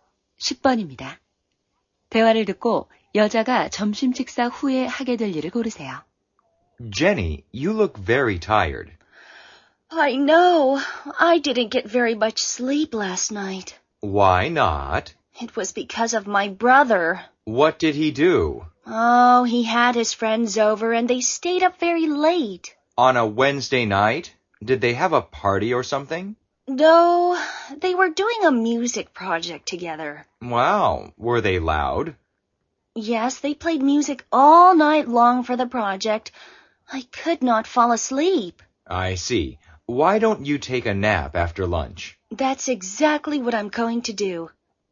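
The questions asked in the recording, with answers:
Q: 대화를 듣고 여자가 점심 식사 후에 하게 될 일을 고르세요.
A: 낮잠 자기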